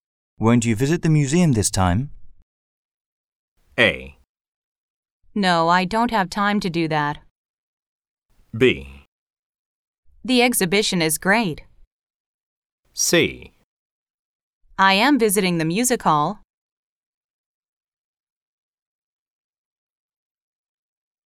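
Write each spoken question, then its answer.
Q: Won't you visit the museum this time?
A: A: No, I don't have time to do that.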